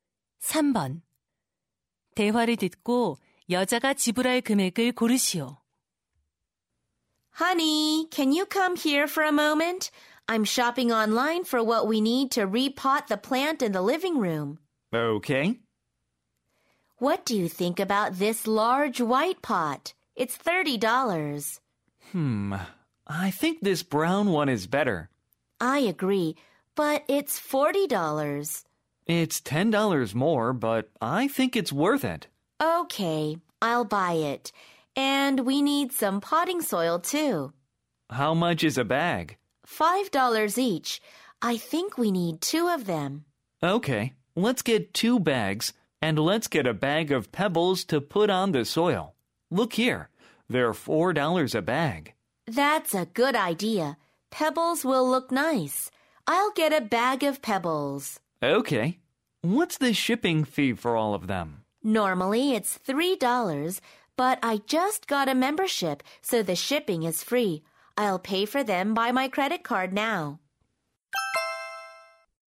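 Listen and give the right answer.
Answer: $54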